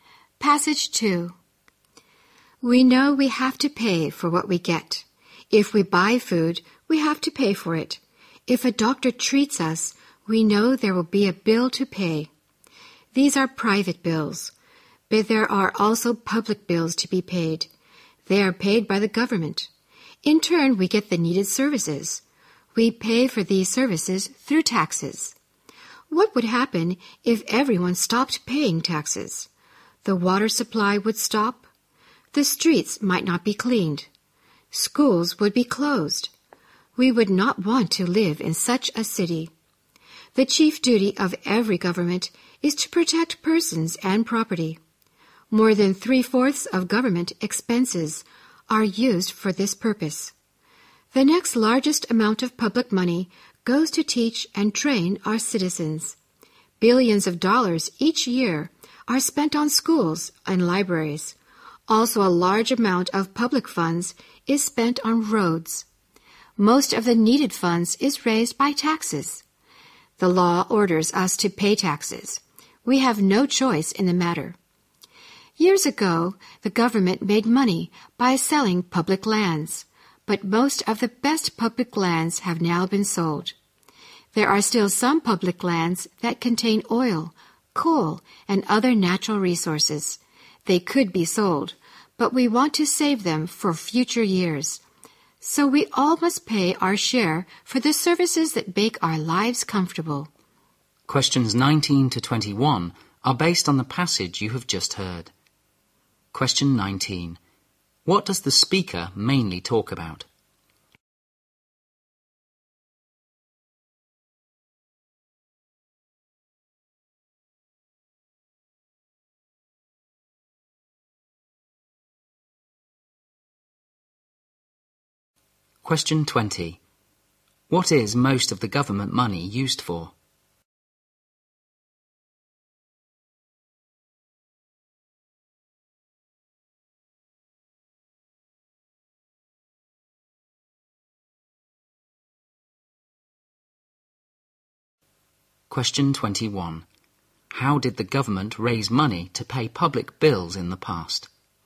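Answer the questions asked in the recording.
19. Why we must pay taxes for public services
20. Protecting persons and property
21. By selling public lands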